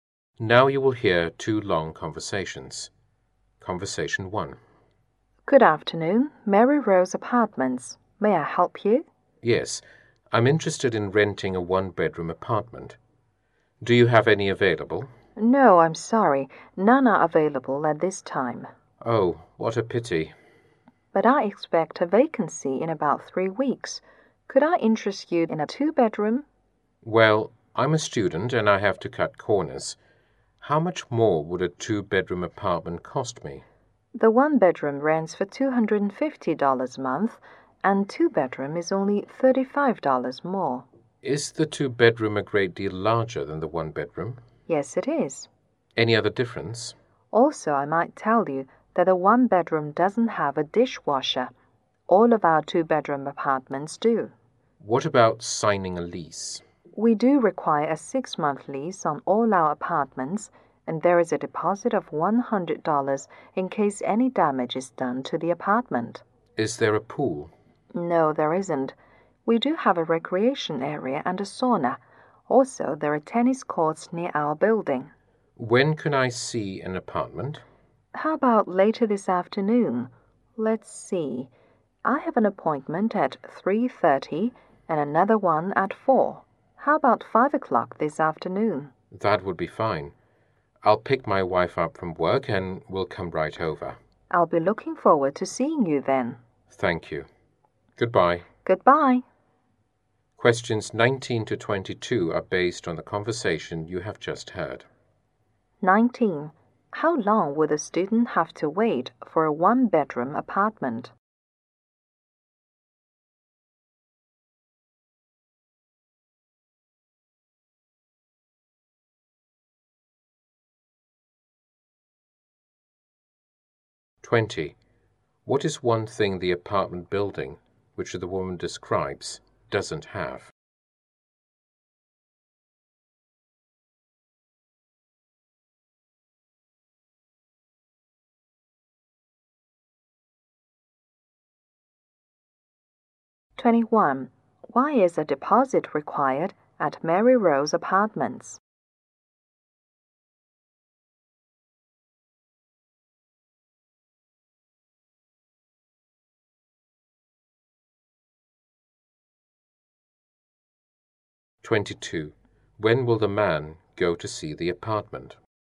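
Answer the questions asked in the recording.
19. About 3 weeks
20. A pool
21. In case any damage is done to the apartment
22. At 5 o'clock this afternoon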